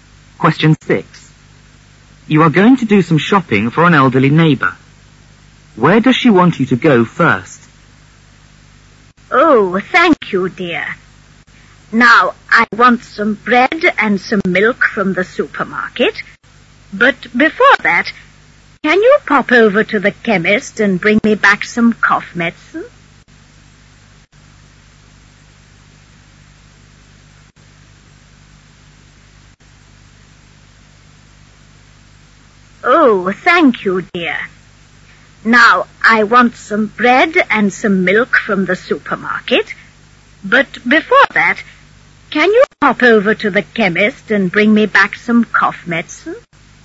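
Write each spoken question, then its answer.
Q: Where does she want you to go first?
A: To the chemist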